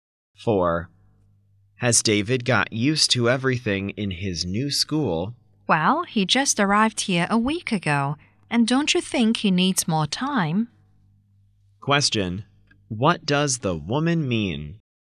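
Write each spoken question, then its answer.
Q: What does the woman mean?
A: David needs more time to get used to his new school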